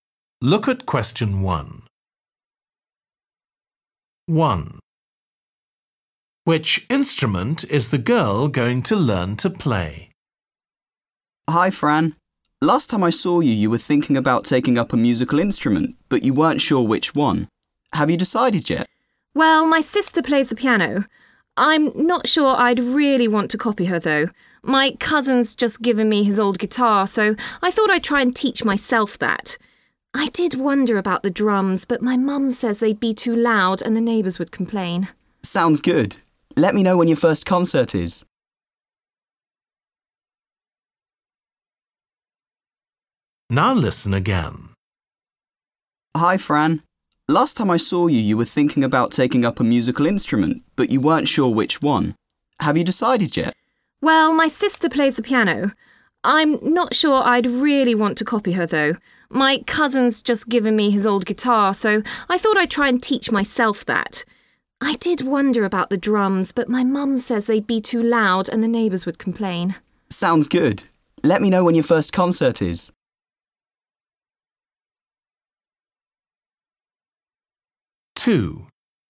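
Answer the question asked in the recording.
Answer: the guitar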